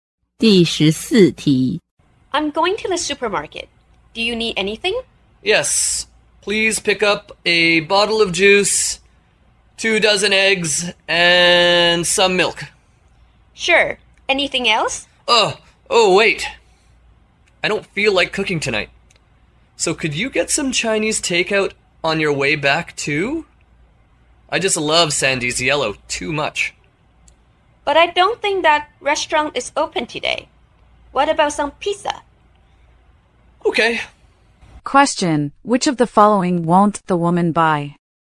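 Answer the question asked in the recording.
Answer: Chinese takeout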